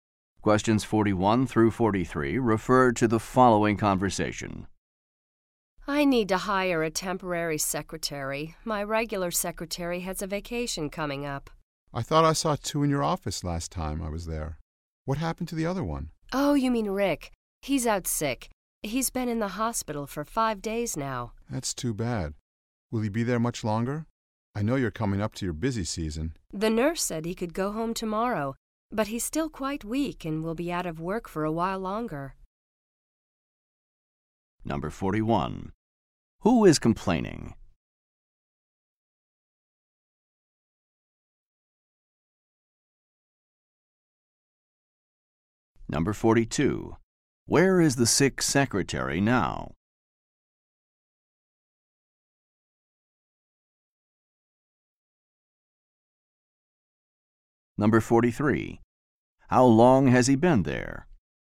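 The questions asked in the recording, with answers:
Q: Where is the sick secretary now?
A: In the hospital

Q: How long has he been there?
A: 5 days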